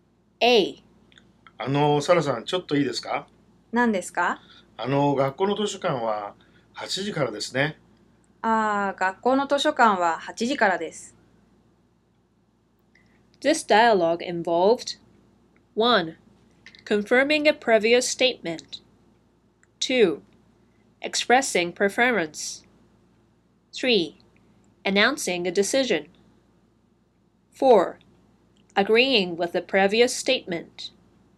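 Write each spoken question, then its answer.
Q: This dialogue involved 1. Confirming a previous statement 2. Expressing preference 3. Announcing a decision 4. Agreeing with the previous statement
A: 1: Confirming a previous statement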